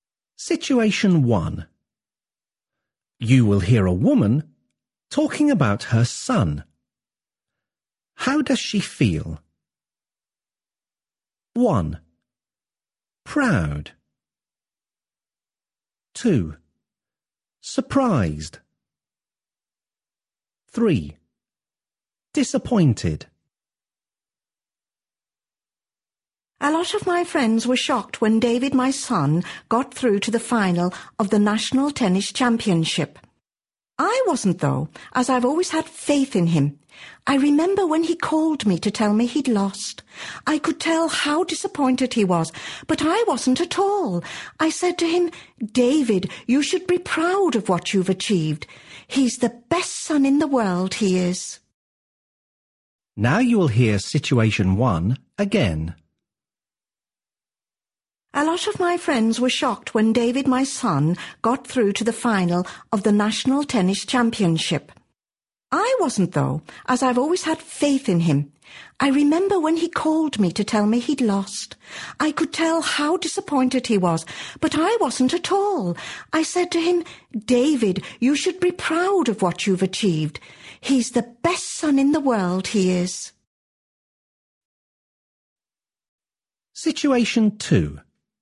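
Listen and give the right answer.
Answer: 1: Proud.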